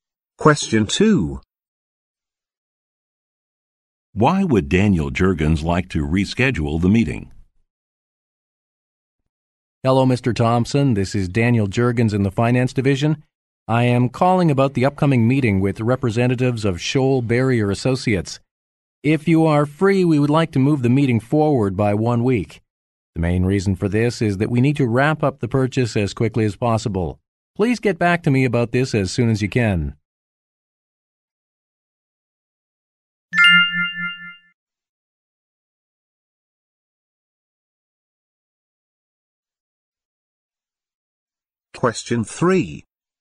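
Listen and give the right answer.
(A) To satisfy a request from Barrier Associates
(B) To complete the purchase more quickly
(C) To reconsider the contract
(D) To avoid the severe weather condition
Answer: (B) To complete the purchase more quickly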